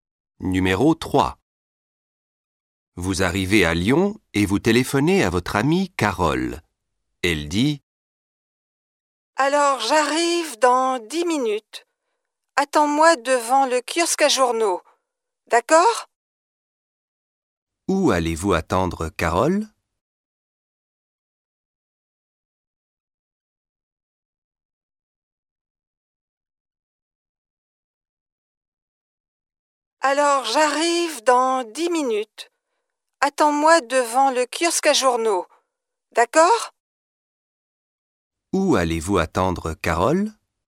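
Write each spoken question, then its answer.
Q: Où allez-vous attendre Carole?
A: devant le kiosque à journaux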